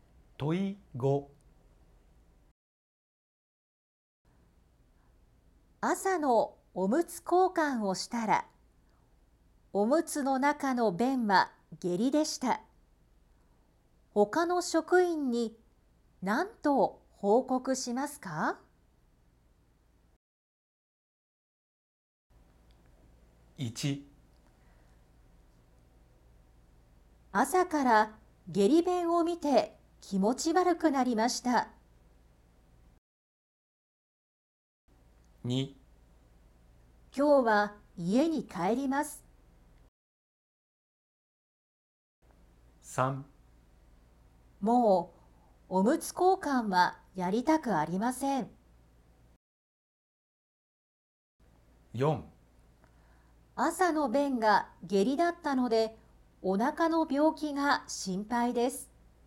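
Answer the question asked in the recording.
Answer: 4: 朝の便が下痢だったのでお腹の病気が心配です。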